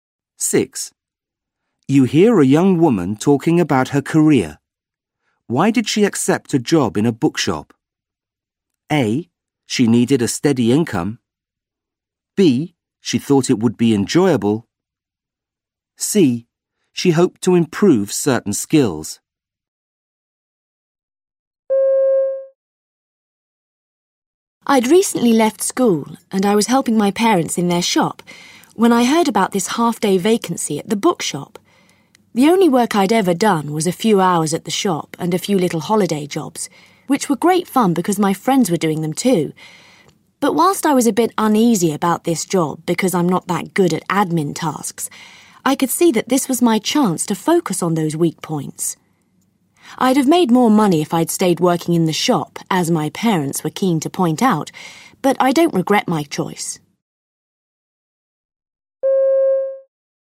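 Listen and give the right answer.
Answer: C: She hoped to improve certain skills.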